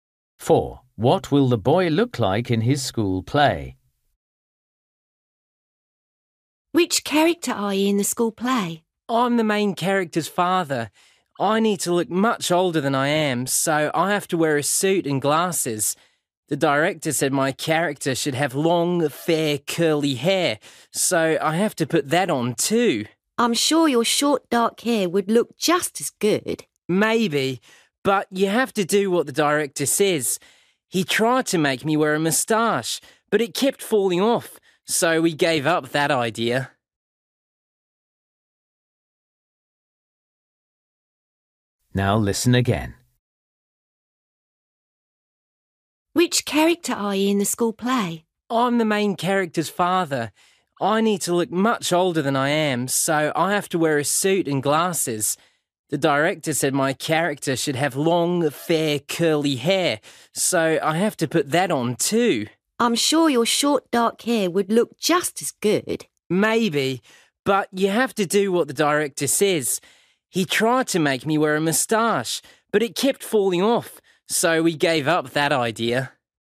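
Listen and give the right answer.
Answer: Suit, glasses and long, fair, curly hair (no moustache)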